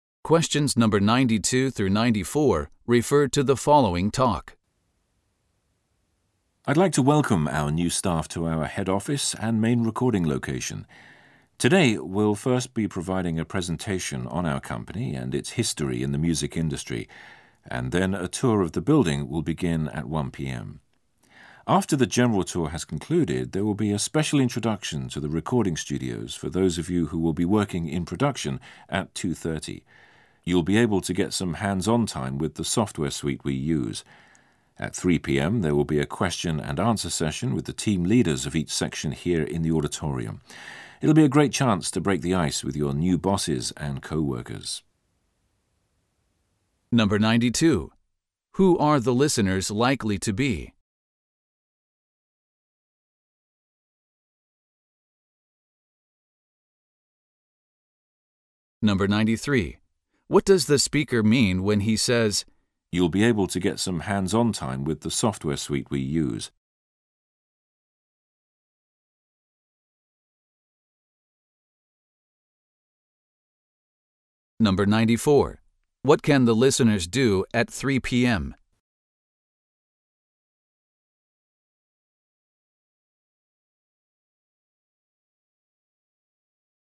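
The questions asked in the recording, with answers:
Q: Who are the listeners likely to be?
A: New employees of a music company

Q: What can the listeners do at 3 p.m.?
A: Ask questions to the team leaders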